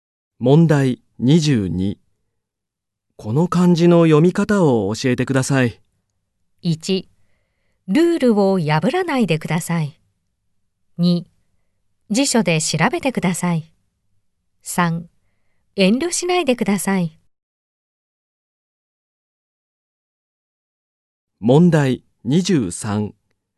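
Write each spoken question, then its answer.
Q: この漢字の読み方を教えてください。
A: 2: 辞書で調べてください。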